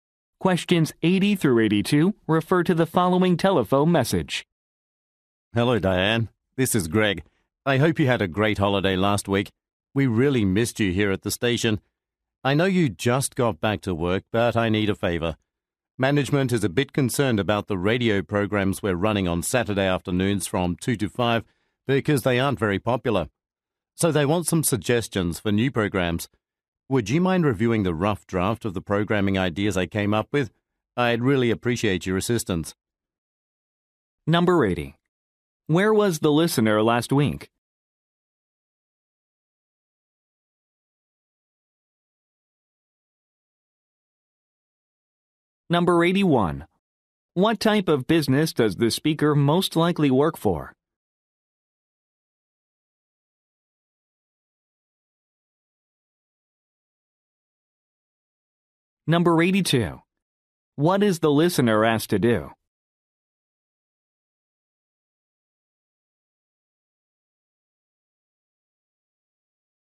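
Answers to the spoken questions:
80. On holiday
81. A radio station
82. Review a rough draft of programming ideas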